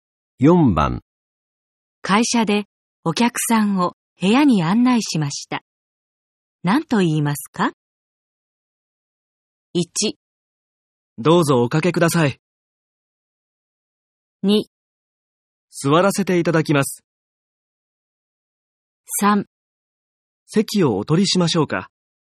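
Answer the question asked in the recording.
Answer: 1: どうぞおかけください。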